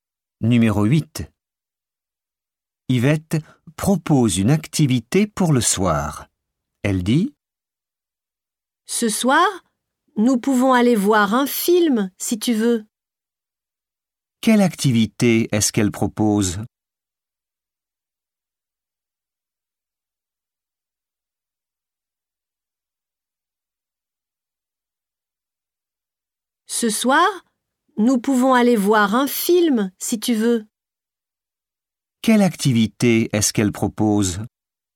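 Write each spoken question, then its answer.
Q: Quelle activité est-ce qu'elle propose ?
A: Aller voir un film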